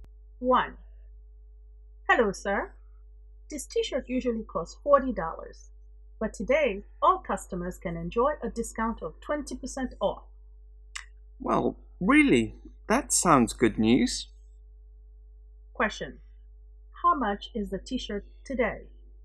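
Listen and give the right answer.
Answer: $32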